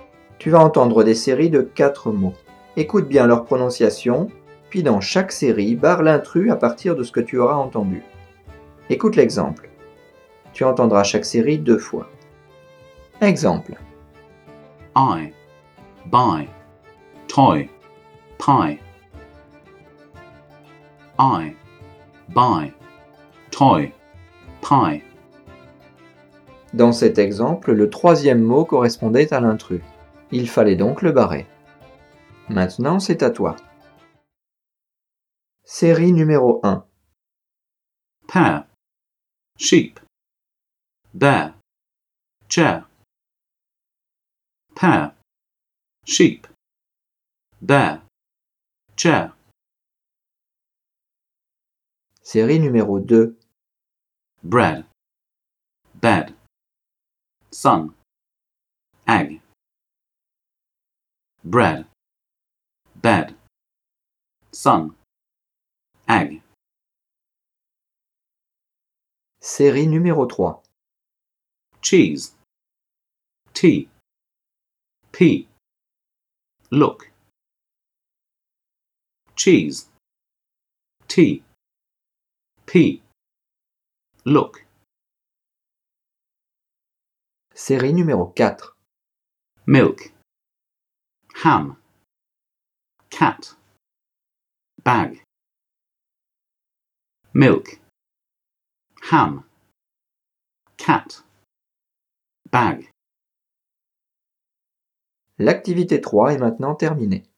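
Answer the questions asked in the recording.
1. sheep
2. sun
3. look
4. milk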